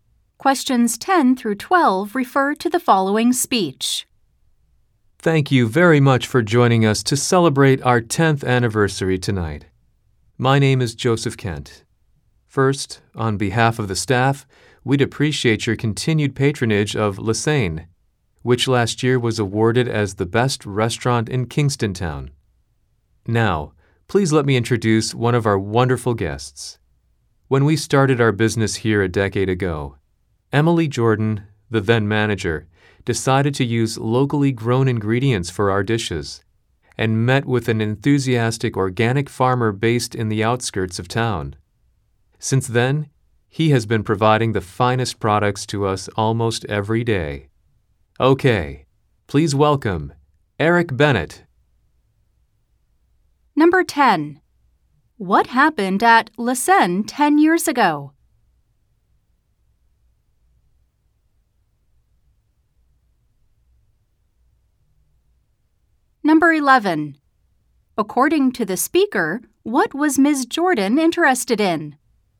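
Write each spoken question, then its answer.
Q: What happened at Le Seine 10 years ago?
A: The restaurant opened for business

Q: According to the speaker, what was Ms. Jordan interested in?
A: Using locally grown ingredients

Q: Who is Eric Bennett?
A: A local organic farmer who supplies the restaurant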